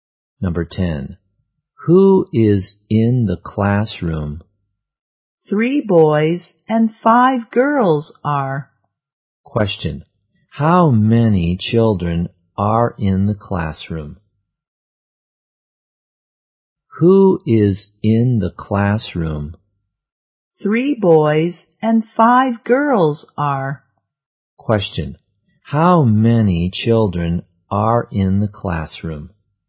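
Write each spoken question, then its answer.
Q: Question. How many children are in the classroom?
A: Eight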